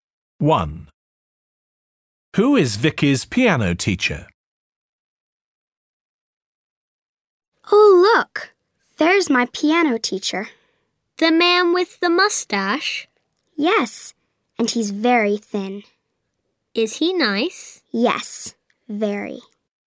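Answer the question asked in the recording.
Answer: The thin man with the mustache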